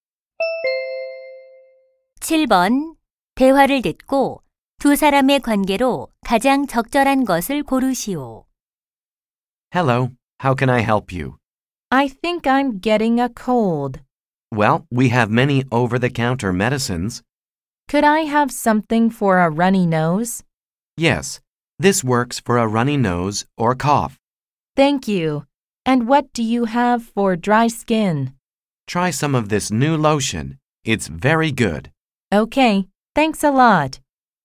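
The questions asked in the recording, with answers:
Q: 대화를 듣고 두 사람의 관계로 가장 적절한 것을 고르시오.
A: 약사와 손님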